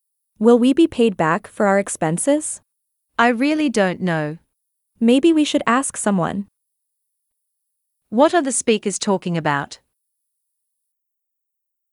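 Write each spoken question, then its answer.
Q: What are the speakers talking about?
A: Getting paid back for expenses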